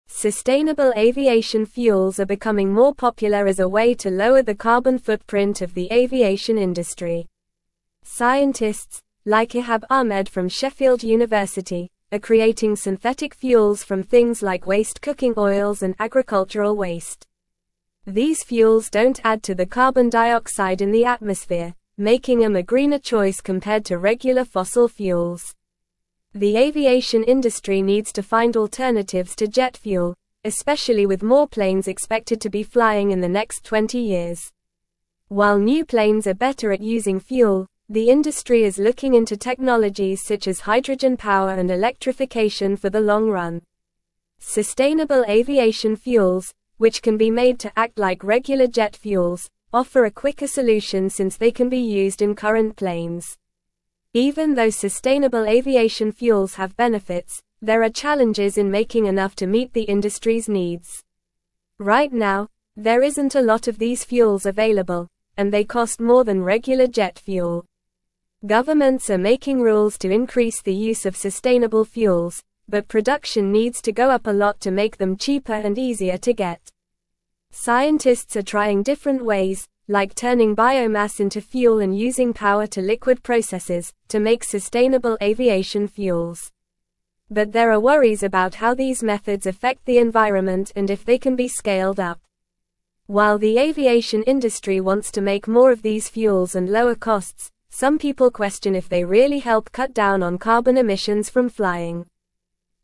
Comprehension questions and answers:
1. Sustainable aviation (1)______ are becoming more popular as a way to lower the carbon footprint of the aviation industry.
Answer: fuels

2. Scientists, like Ihab Ahmed from Sheffield University, are creating synthetic fuels from (2)______ like waste cooking oils and agricultural waste.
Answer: things

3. These fuels don't add to the carbon dioxide in the (3)______, making them a greener (4)______ compared to regular fossil fuels.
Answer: atmosphere

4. These fuels don't add to the carbon dioxide in the (3)______, making them a greener (4)______ compared to regular fossil fuels.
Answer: choice

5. The aviation industry needs to find alternatives to jet fuel, especially with more (5)______ (6)______ to be flying in the next 20 years.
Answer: planes

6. The aviation industry needs to find alternatives to jet fuel, especially with more (5)______ (6)______ to be flying in the next 20 years.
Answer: expected

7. While new planes are (7)______ at using fuel, the industry is (8)______ into technologies such as hydrogen power and electrification for the long run.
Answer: better

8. While new planes are (7)______ at using fuel, the industry is (8)______ into technologies such as hydrogen power and electrification for the long run.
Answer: looking

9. Even though sustainable aviation fuels have benefits, there are challenges in (9)______ enough to meet the industry's needs.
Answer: making

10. Right now, there isn't a lot of these fuels (10)______, and they cost more than regular jet fuel.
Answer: available

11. Governments are making (11)______ to increase the use of sustainable fuels, but production needs to go up a lot to make them cheaper and (12)______ to get.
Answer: rules

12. Governments are making (11)______ to increase the use of sustainable fuels, but production needs to go up a lot to make them cheaper and (12)______ to get.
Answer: easier

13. Scientists are trying different ways, like turning biomass into fuel and (13)______ power-to-liquid (14)______, to make sustainable aviation fuels.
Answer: using

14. Scientists are trying different ways, like turning biomass into fuel and (13)______ power-to-liquid (14)______, to make sustainable aviation fuels.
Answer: processes

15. While the aviation (15)______ wants to make more of these fuels and lower costs, some people question if they really help cut down on (16)______ emissions from flying.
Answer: industry

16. While the aviation (15)______ wants to make more of these fuels and lower costs, some people question if they really help cut down on (16)______ emissions from flying.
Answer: carbon

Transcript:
Sustainable aviation fuels are becoming more popular as a way to lower the carbon footprint of the aviation industry. Scientists, like Ihab Ahmed from Sheffield University, are creating synthetic fuels from things like waste cooking oils and agricultural waste. These fuels don't add to the carbon dioxide in the atmosphere, making them a greener choice compared to regular fossil fuels.
The aviation industry needs to find alternatives to jet fuel, especially with more planes expected to be flying in the next 20 years. While new planes are better at using fuel, the industry is looking into technologies such as hydrogen power and electrification for the long run. Sustainable aviation fuels, which can be made to act like regular jet fuels, offer a quicker solution since they can be used in current planes.
Even though sustainable aviation fuels have benefits, there are challenges in making enough to meet the industry's needs. Right now, there isn't a lot of these fuels available, and they cost more than regular jet fuel. Governments are making rules to increase the use of sustainable fuels, but production needs to go up a lot to make them cheaper and easier to get.
Scientists are trying different ways, like turning biomass into fuel and using power-to-liquid processes, to make sustainable aviation fuels. But there are worries about how these methods affect the environment and if they can be scaled up. While the aviation industry wants to make more of these fuels and lower costs, some people question if they really help cut down on carbon emissions from flying.

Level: Level 3